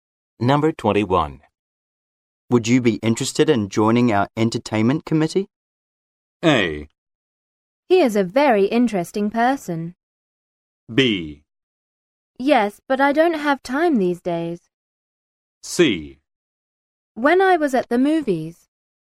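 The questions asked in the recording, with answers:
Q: Would you be interested in joining our entertainment committee?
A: B: Yes, but I don't have time these days.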